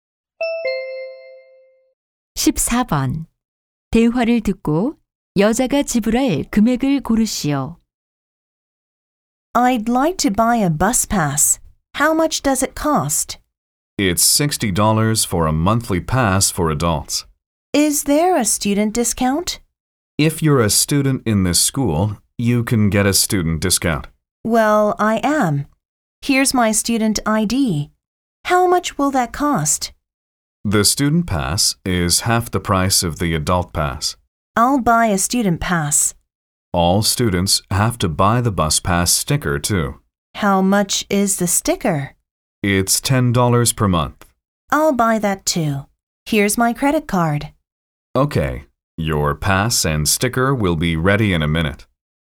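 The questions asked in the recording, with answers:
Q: 대화를 듣고 여자가 지불할 금액을 고르시오.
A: $40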